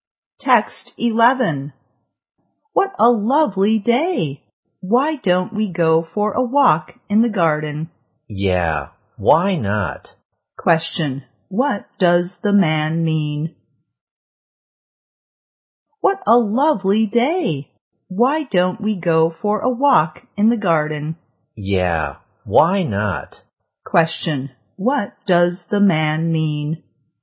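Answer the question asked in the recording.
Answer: He agrees to go for a walk in the garden.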